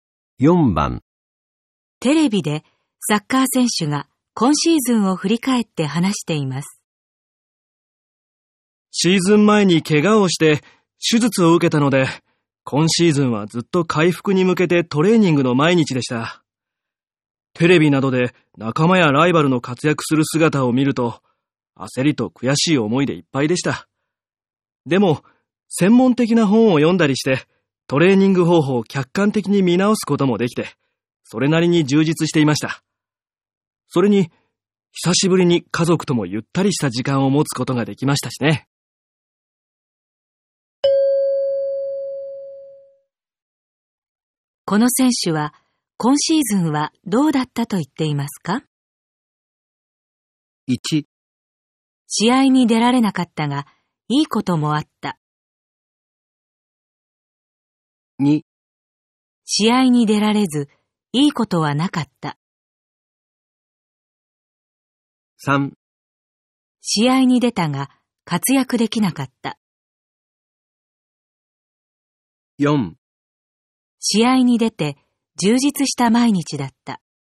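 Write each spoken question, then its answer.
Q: この選手は、今シーズンはどうだったと言っていますか?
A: 1: 試合に出られなかったが、いいこともあった。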